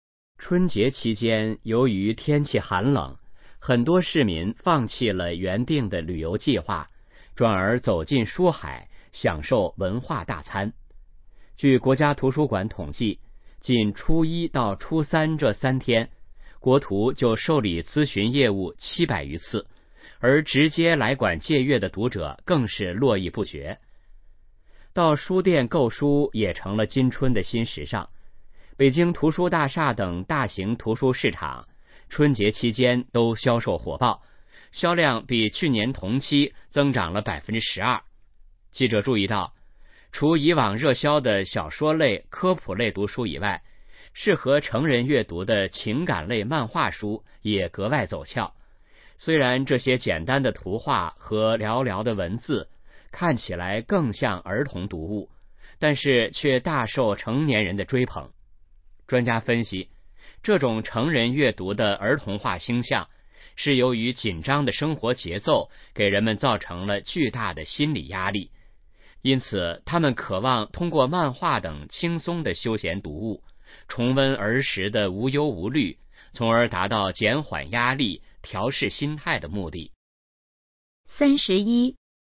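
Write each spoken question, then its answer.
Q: 根据这段话,市民放弃旅行计划的原因是什么?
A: 天气寒冷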